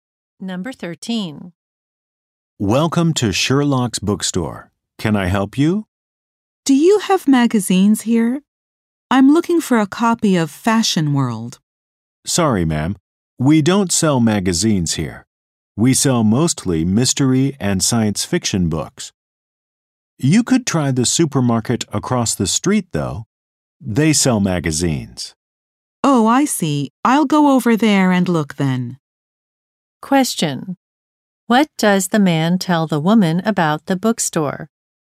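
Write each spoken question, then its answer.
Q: What does the man tell the woman about the bookstore?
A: It doesn't sell magazines; it sells mostly mystery and science fiction books.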